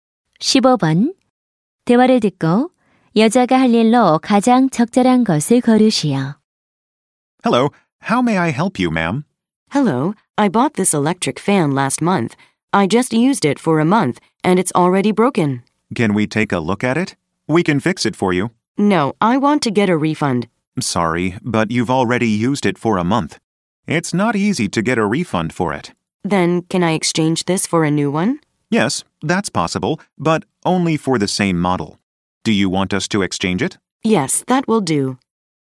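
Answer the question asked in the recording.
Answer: 선풍기를 같은 모델의 새 제품으로 교환하기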